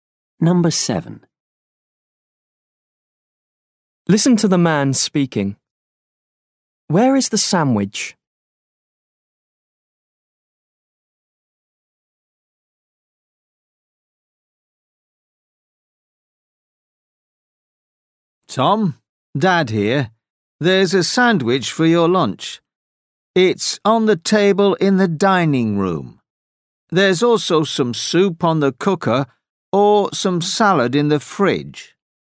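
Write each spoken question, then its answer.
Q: Where is the sandwich?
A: On the table in the dining room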